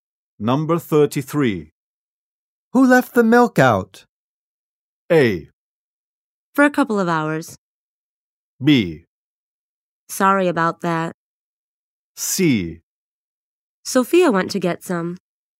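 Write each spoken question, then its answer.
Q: Who left the milk out?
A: B: Sorry about that.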